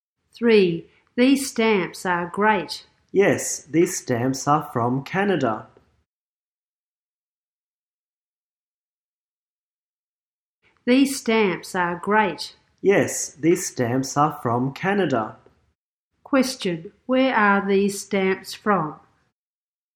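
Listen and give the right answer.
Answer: Canada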